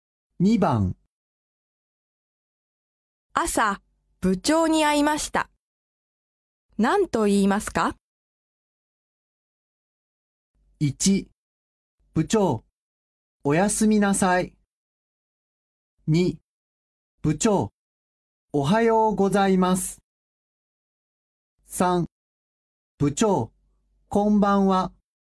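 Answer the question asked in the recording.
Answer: 2: 部長、おはようございます。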